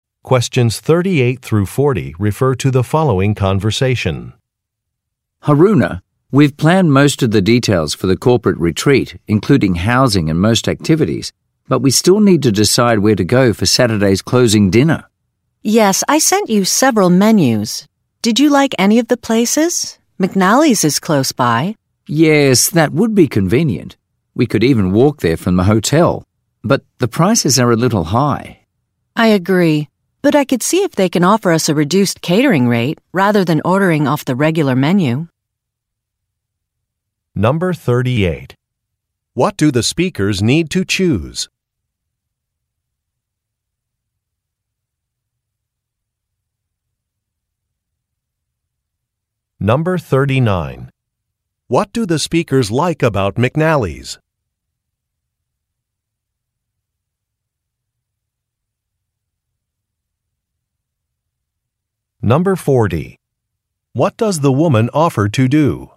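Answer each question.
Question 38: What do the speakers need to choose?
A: A location for a dinner

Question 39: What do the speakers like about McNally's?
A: It is nearby.

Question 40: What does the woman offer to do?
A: Discuss pricing options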